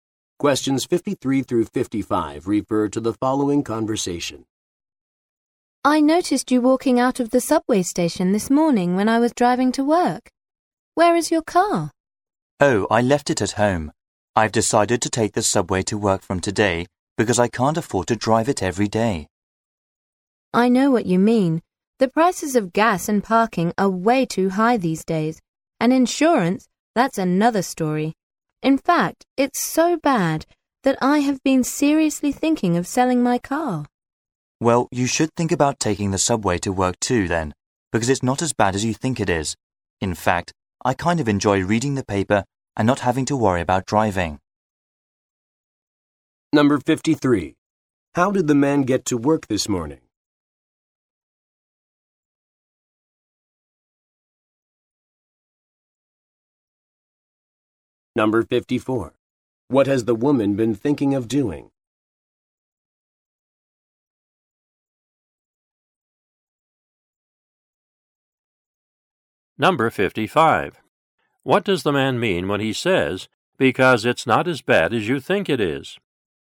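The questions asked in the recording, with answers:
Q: How did the man get to work this morning?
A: By subway

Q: What has the woman been thinking of doing?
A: Selling her car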